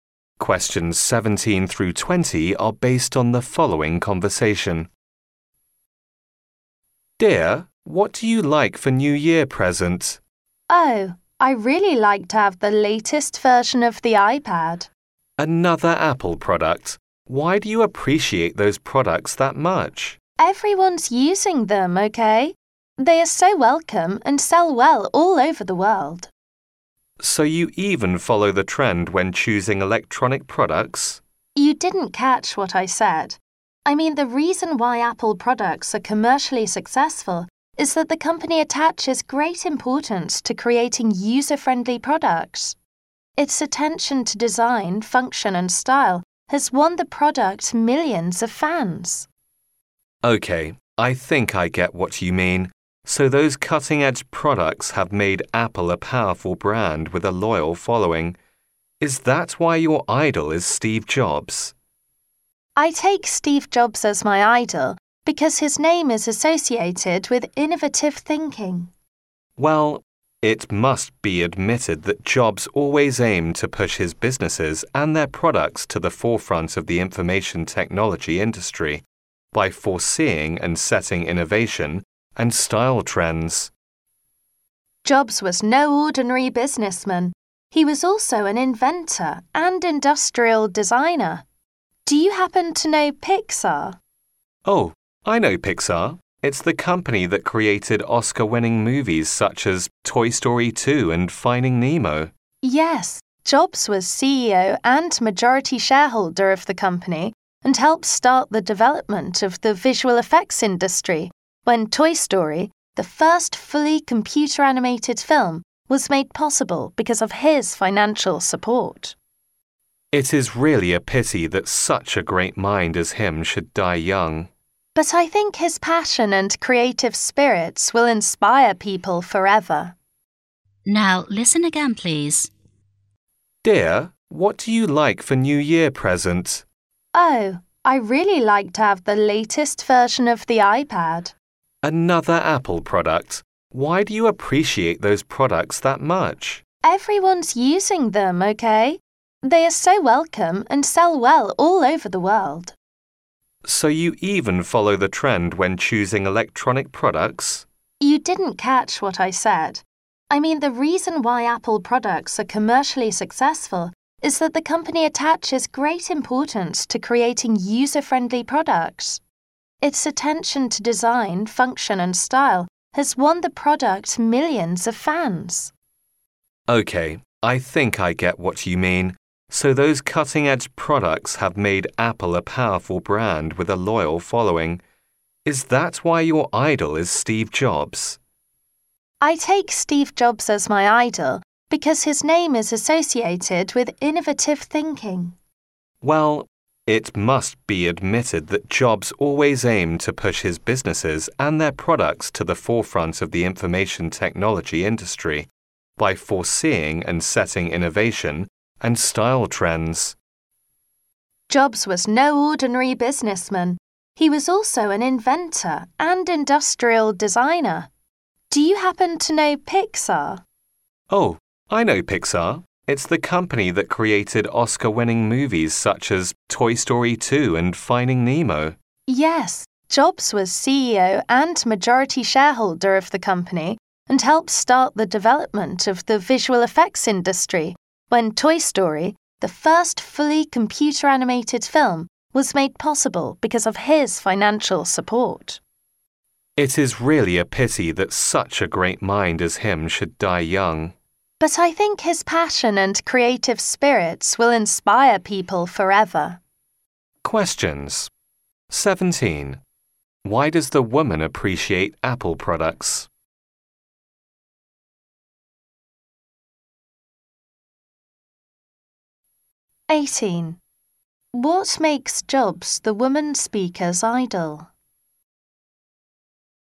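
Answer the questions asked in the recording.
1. They are user-friendly, with attention to design, function and style.
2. His name is associated with innovative thinking.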